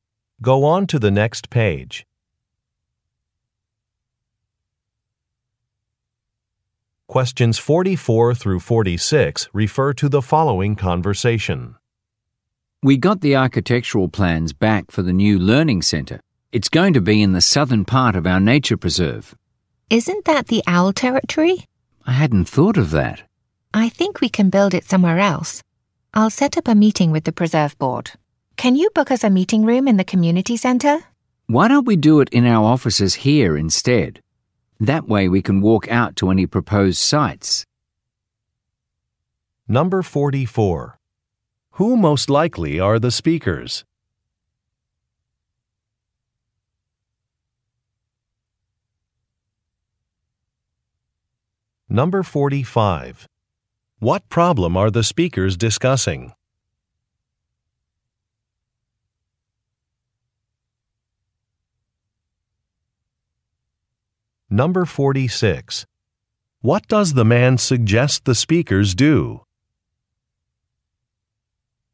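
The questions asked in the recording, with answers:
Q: What problem are the speakers discussing?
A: The planned site is in owl territory

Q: What does the man suggest the speakers do?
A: Hold the meeting in their own offices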